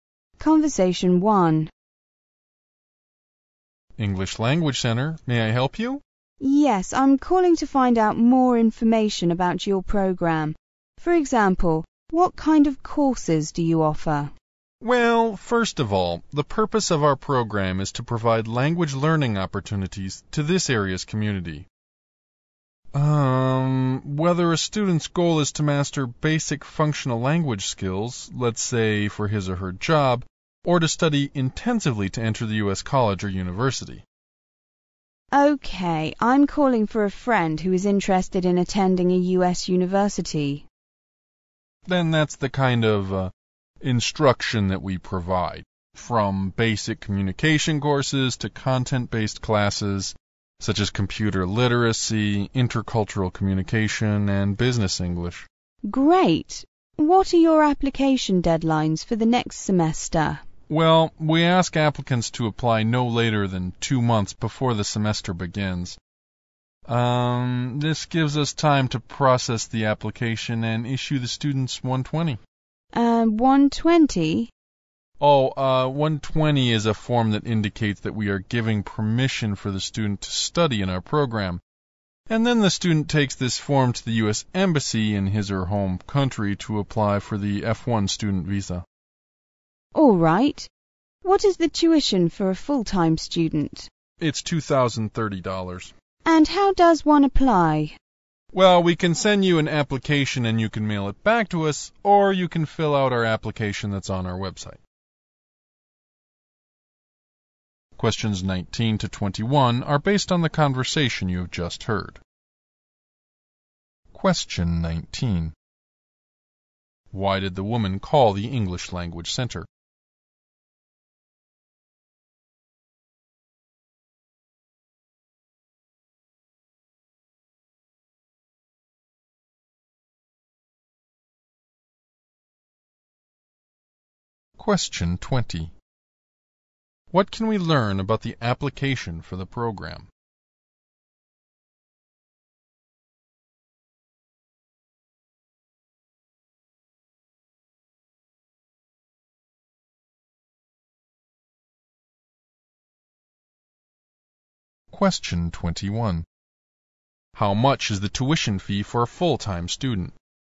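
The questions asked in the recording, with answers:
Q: Why did the woman call the English Language Center?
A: To get information about the program for a friend

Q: What can we learn about the application for the program?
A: Apply no later than 2 months before the semester begins

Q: How much is the tuition fee for a full-time student?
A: $2,030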